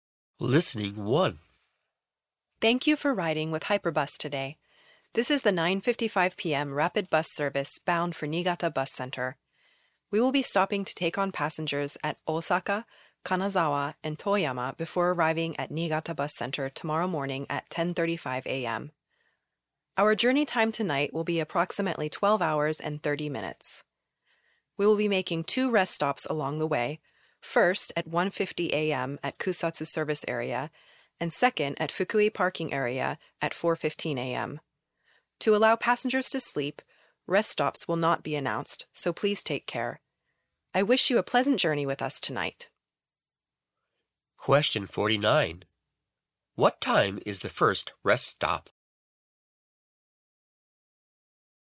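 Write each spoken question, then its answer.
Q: What time is the first rest stop?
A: At 1:50 a.m.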